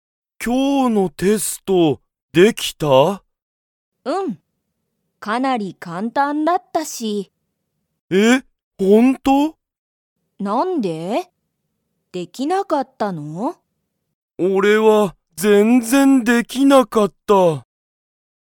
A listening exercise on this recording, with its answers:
ヒロトは、今日きょうのテストができましたか?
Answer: いいえ

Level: Level 1